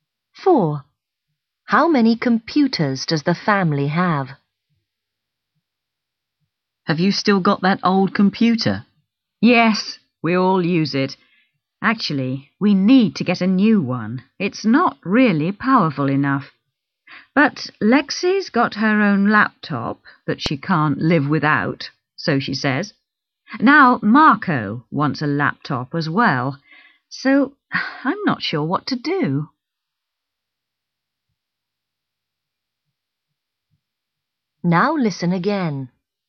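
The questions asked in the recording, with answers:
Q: How many computers does the family have?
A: Two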